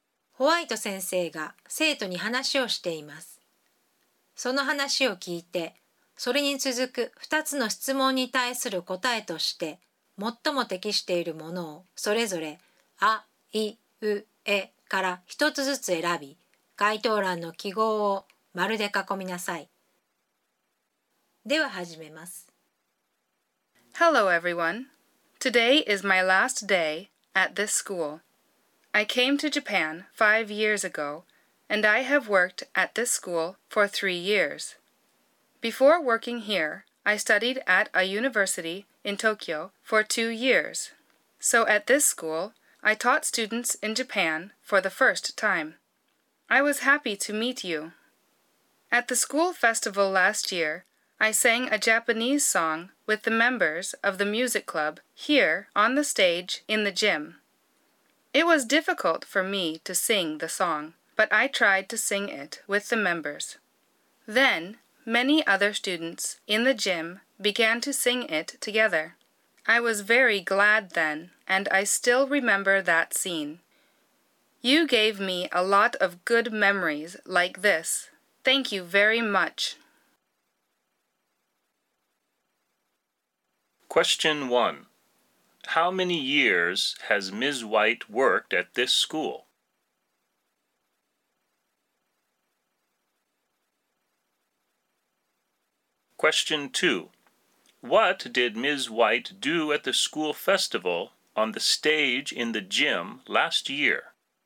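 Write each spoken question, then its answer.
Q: How many years has Ms. White worked at this school?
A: 3 years

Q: What did Ms. White do at the school festival on the stage in the gym last year?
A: She sang a Japanese song with the members of the music club.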